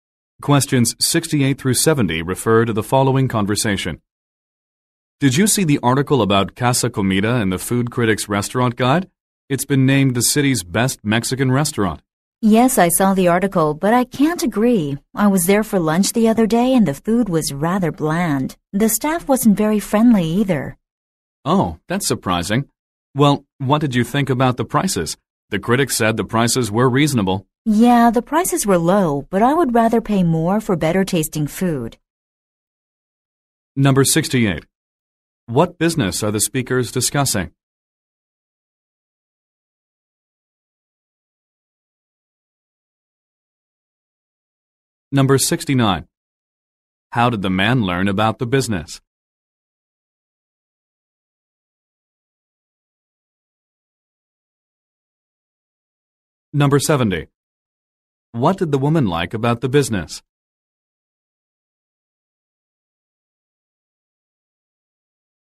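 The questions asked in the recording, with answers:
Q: What business are the speakers discussing?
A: A Mexican restaurant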